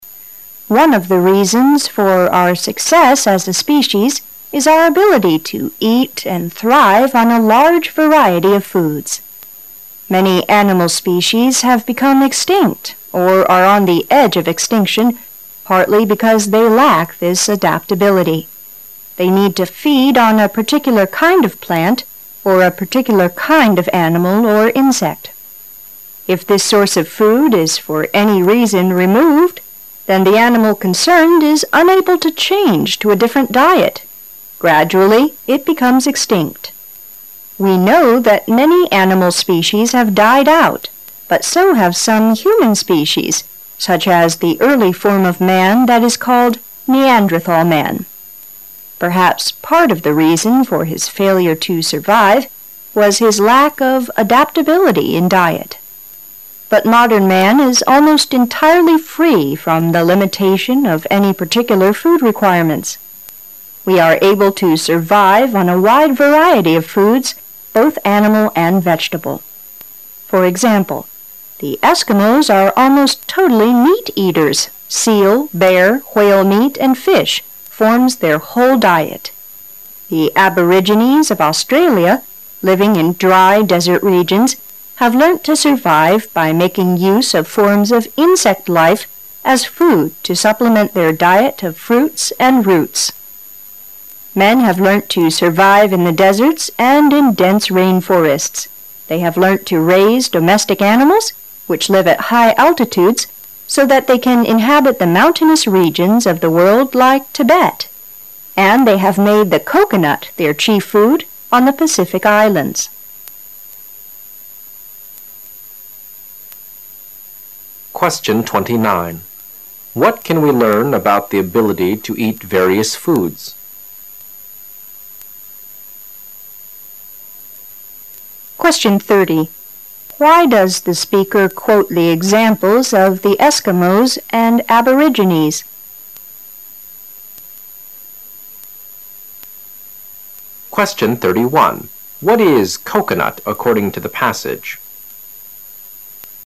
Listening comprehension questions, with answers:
Passage Two Questions 29 to 31 are based on the passage you have just heard.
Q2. Why does the speaker quote the examples of the Eskimos and Aborigines?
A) To show how dependent some men are on a particular food.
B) To show how primitive the diet of some people still is.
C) To show what different foods are eaten in different places of the world.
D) To show the adaptability of man as regards his diet.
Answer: To show the adaptability of man as regards his diet.

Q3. What is coconut according to the passage?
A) A very popular food plant:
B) A plant with limited uses.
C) A food plant which has been thoroughly used.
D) A plant used as a main food on the Pacific Islands.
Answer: A plant used as a main food on the Pacific Islands.

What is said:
[解析] 29-31 One of the reasons for our success as a species is our ability to eat and thrive on a large variety of foods. Many animal species have become extinct or are on the edge of extinction partly because they lack this adaptability. They need to feed on a particular kind of plant or a particular kind of animal or insect. If this source of food is for any reason re- moved, then the animal concerned is unable to change to a different diet. Gradually it becomes extinct. We know that many animal species have died out, but so have some human species such as the early form of mall that is called Neanderthal man. Perhaps part of the reason for his failure to survive was his lack of adaptability in diet. But modern man is almost entirely free from the limitation of any particular food requirements. We are able to survive on a wide variety of foods both animal and vegetable. For example, the Eskimos are almost totally meat eaters: seal, bear, whale meat and fish form their whole diet; the Aborigines of Australia, living in dry desert regions, have learnt to survive by making use of forms of insect life as food to supplement their diet of fruits and roots. Men have learnt to survive in the deserts and in dense rain forests; they have learnt to raise domestic animals, which live at high altitudes so that they can inhabit the mountainous regions of the world like Tibet; and they have made the coconut their chief food on the Pacific islands. 29. What can we learn about the ability to eat various foods?

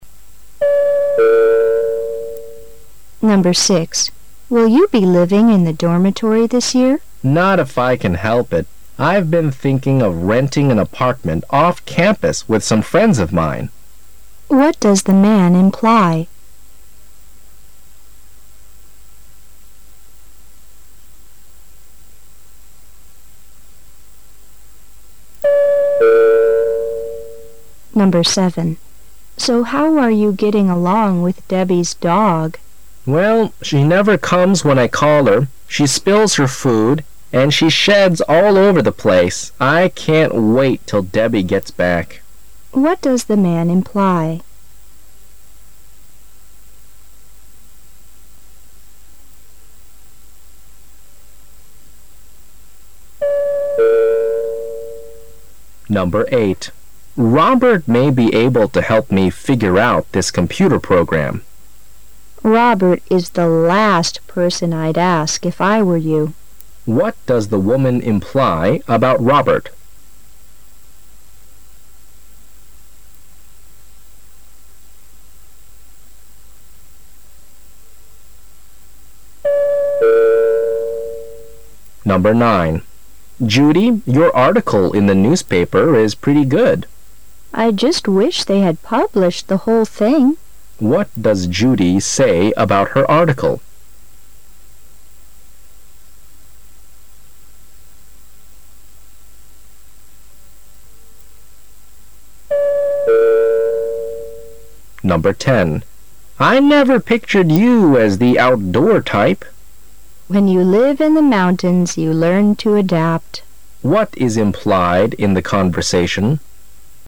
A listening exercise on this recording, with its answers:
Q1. What does Judy say about her article?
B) The original article is longer than the part that was published.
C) She plans to publish more articles.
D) She has published more articles in other newspapers.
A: The original article is longer than the part that was published.

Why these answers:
M: Judy, your article in the newspaper is pretty good. W: I just wish they had published the whole thing. Q: What does Judy say about her article?

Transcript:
[解析] W: Will you be living in the dormitory this year? M: Not if I can help it. I've been thinking of renting an apartment off campus with some friends of mine. What does the man imply?
[解析] W: So how are you getting along with Debbie's dog? M: Well, she never comes when I call her, she spills her food, and she sheds all over the place. I can't wait till Debbie gets back.
[解析] M: Robert may be able to help me figure out this computer program. W: Robert is the last person I' d ask if I were you. Q: What does the woman imply about Robert?
[解析] M: Judy, your article in the newspaper is pretty good. W: I just wish they had published the whole thing. Q: What does Judy say about her article?

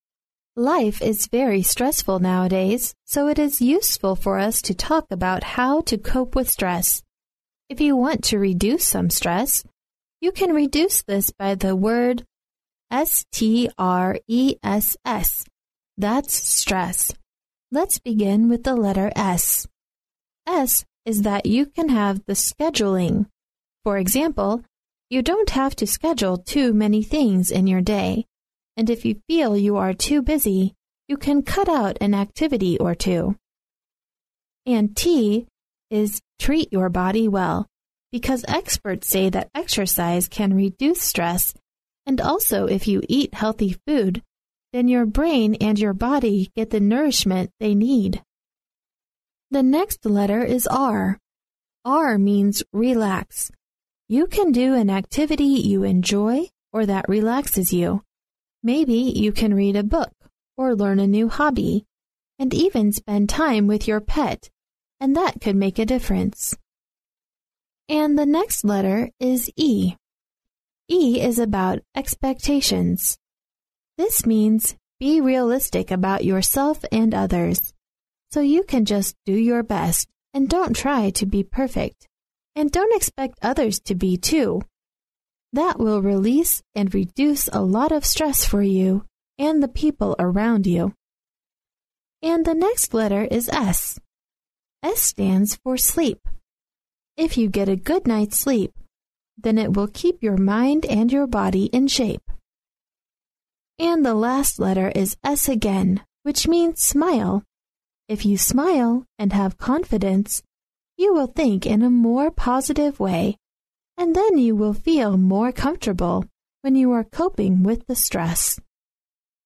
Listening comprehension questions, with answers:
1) According to the passage, "scheduling" means that you ______.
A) need to be efficient in work.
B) plan your work properly.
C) try to finish work ahead of time.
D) know how to work in teams.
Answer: plan your work properly.

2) One of the ways to reduce stress is to ______.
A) do better than anyone else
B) fulfill high ambitions in one's work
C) work and have reasonable aims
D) start with a relatively low aim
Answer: work and have reasonable aims

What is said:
[听力原文] Life is very stressful nowadays, so it is useful for us to talk about how to cope with stress. If you want to reduce some stress, you can reduce this by the word S-T-R-E-S-S that's stress. Let's begin with the "S". "S" is that you can have the "scheduling", for example, you don't have to schedule too many things in your day and if you feel you are too busy, you can cut out an activity or two. And "T" is "treat your body well", because experts say that exercise can reduce stress and also if you eat healthy food, then your brain and your body get the nourishment they need. The next letter is "R". "R" means 'relax'. You can do an activity you enjoy or that relaxes you, maybe you can read a book or learn a new hobby and even spend time with your pet and that could make a difference. And the next letter is "E"—"E" is about expectations. This means, be realistic about yourself and others. So you can just do your best and don't try to be perfect and don't expect others to be too. That will release and reduce a lot of stress for you and the people around you. And the next letter is "S", "S" stands for sleep. If you get a good night's sleep, then it will keep your mind and your body in shape. And the last letter is "S" again which means "smile". If you smile and have confidence, you will think in a more positive way and then you will feel more comfortable when you are coping with the stress.

